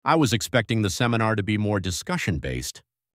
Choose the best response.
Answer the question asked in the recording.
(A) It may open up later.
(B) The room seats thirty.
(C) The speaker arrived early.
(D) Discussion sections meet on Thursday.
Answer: (A) It may open up later.